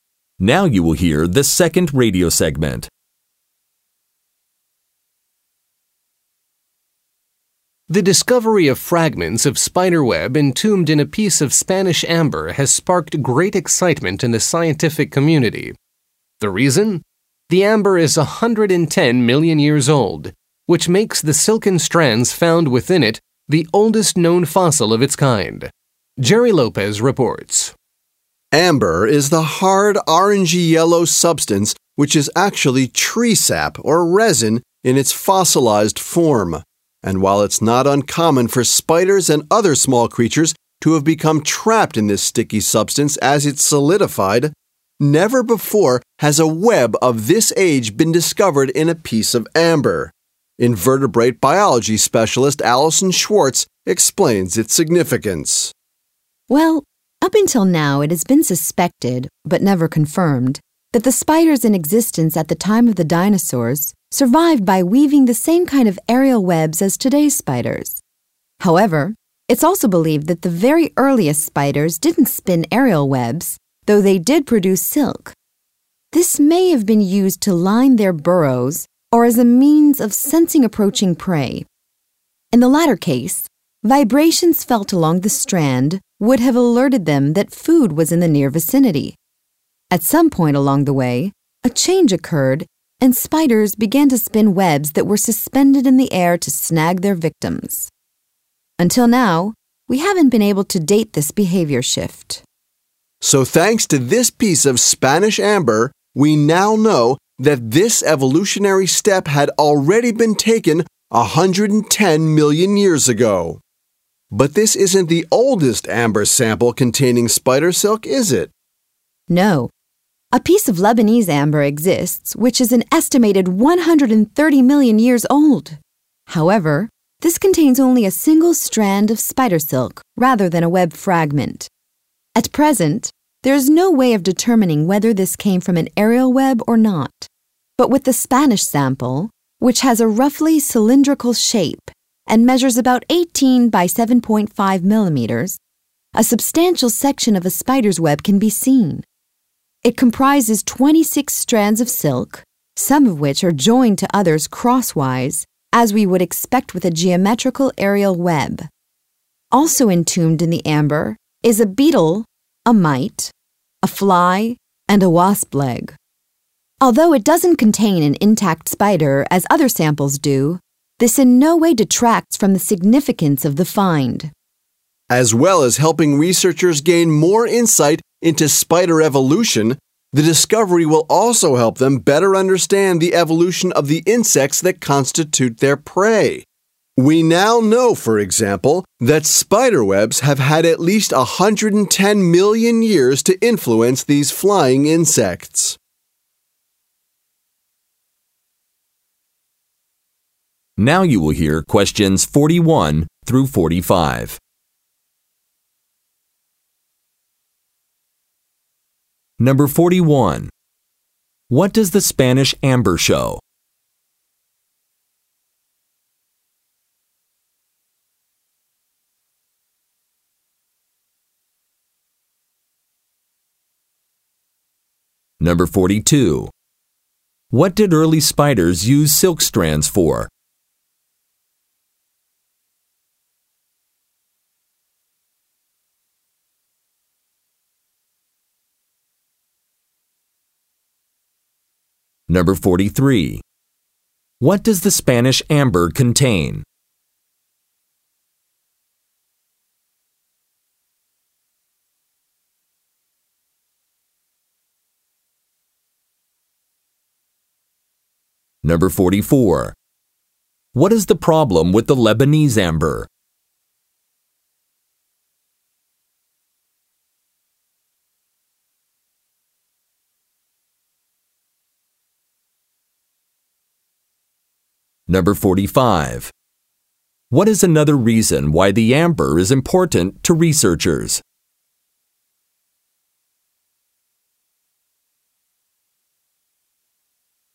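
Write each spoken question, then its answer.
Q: What does the Spanish amber show?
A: Spiders were already spinning aerial webs 110 million years ago

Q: What did early spiders use silk strands for?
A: To line their burrows or to sense approaching prey

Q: What does the Spanish amber contain?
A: A web fragment of 26 silk strands plus a beetle, a mite, a fly and a wasp leg

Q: What is the problem with the Lebanese amber?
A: It has only a single strand, so it can't be determined whether it came from an aerial web

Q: What is another reason why the amber is important to researchers?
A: It helps them understand the evolution of insects that spiders prey on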